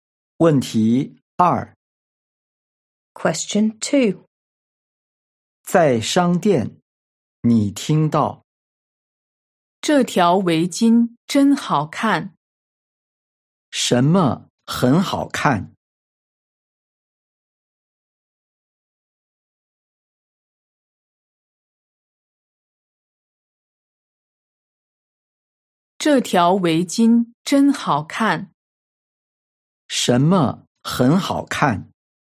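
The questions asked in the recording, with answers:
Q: 什么很好看?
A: 围巾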